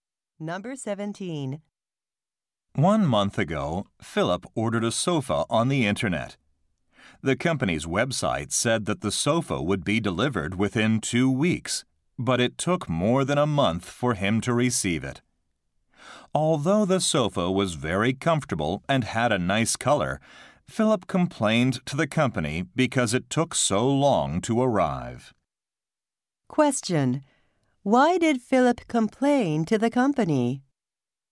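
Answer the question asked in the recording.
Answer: The sofa took too long to arrive.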